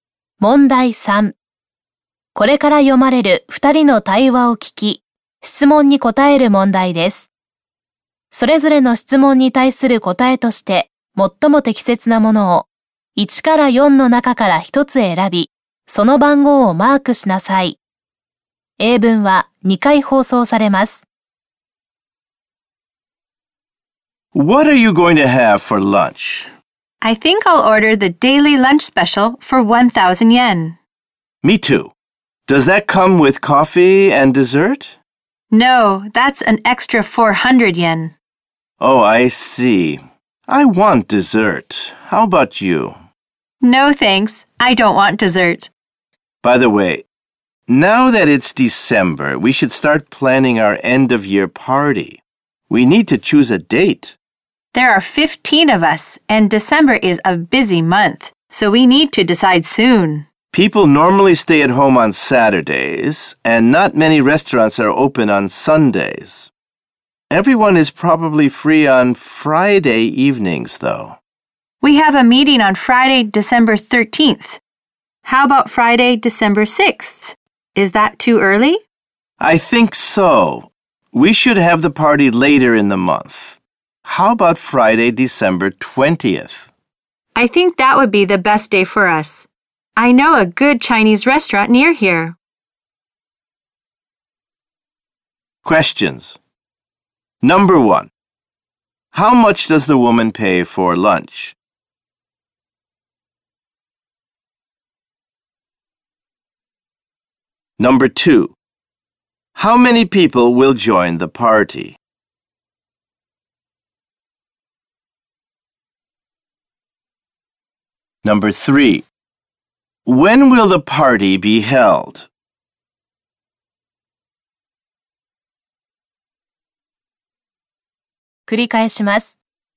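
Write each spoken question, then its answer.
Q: How many people will join the party?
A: 15

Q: When will the party be held?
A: Friday, December 20th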